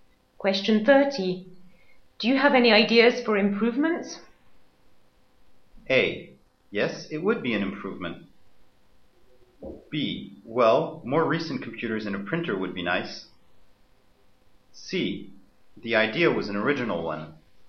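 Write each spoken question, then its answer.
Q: Do you have any ideas for improvements?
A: B: Well, more recent computers and a printer would be nice.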